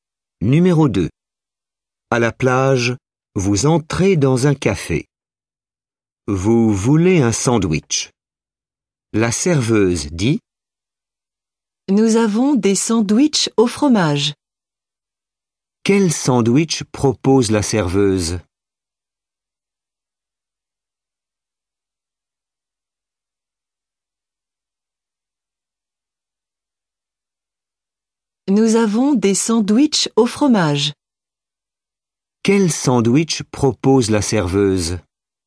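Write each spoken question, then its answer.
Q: Quel sandwich propose la serveuse?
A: Des sandwichs au fromage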